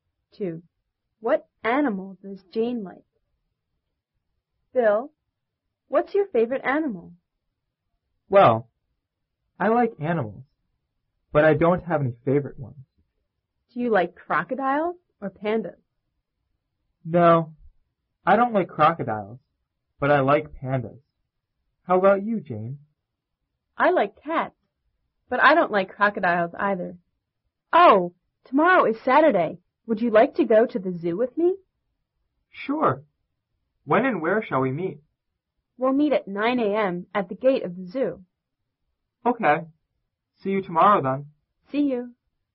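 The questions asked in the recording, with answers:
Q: What animal does Jane like?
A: Cats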